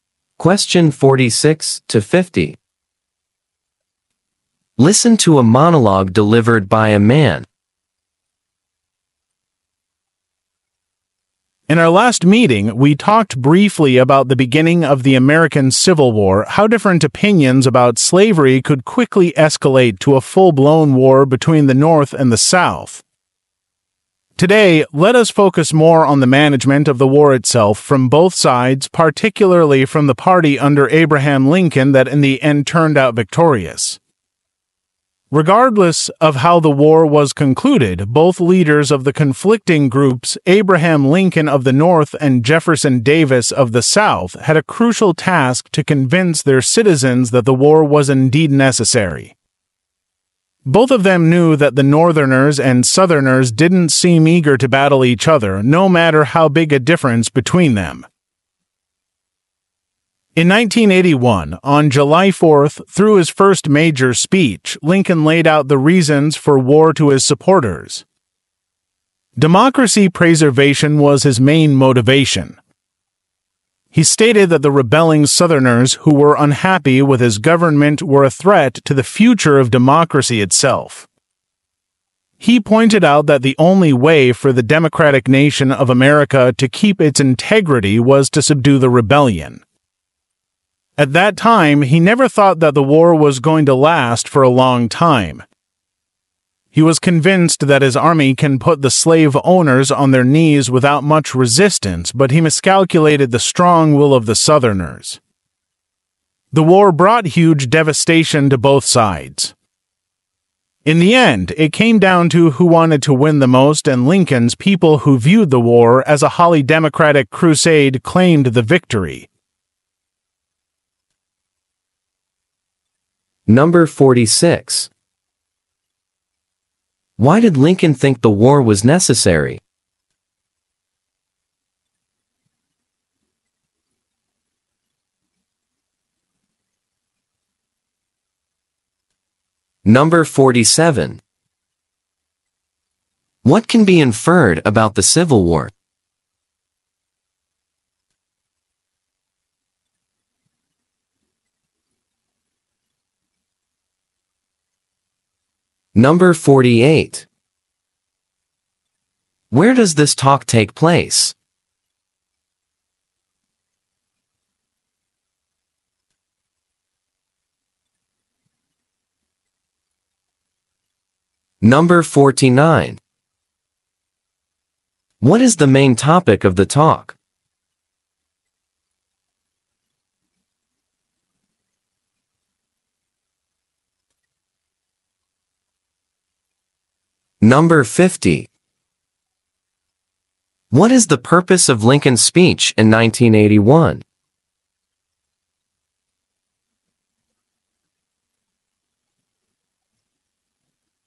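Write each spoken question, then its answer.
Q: Why did Lincoln think the war was necessary?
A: To preserve democracy

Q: What is the purpose of Lincoln's speech in 1981?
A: To explain the reasons for the war to his supporters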